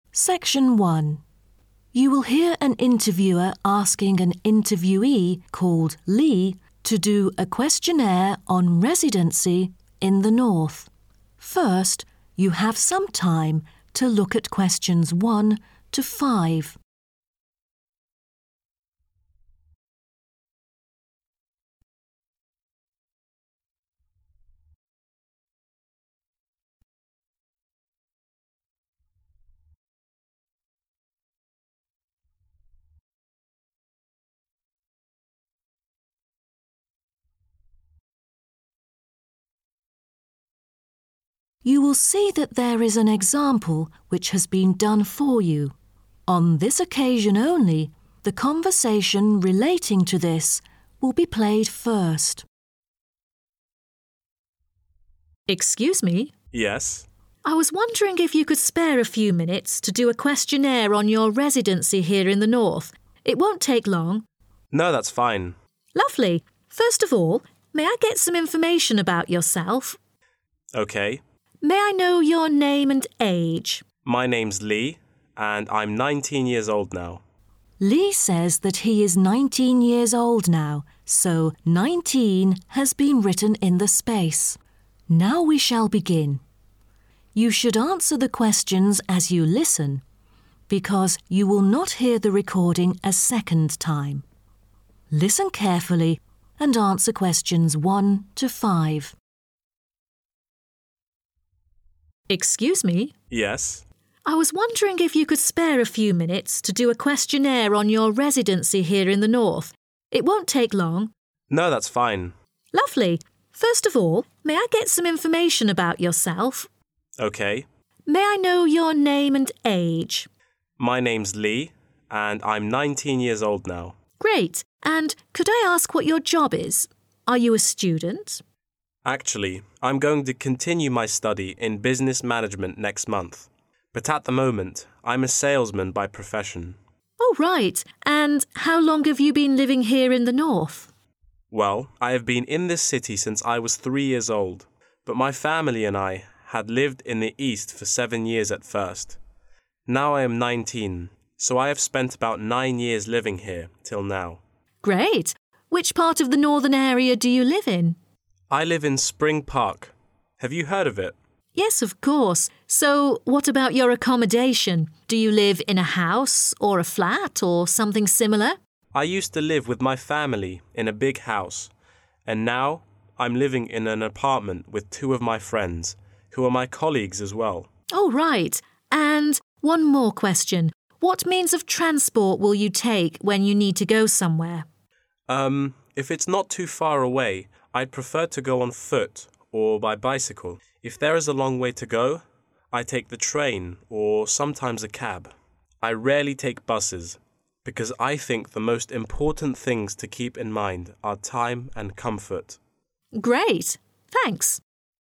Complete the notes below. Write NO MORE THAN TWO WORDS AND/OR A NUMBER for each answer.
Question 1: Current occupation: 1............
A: salesman

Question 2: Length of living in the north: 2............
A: 9 years

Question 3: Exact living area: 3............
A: Spring Park

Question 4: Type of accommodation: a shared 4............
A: apartment

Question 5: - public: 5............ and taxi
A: train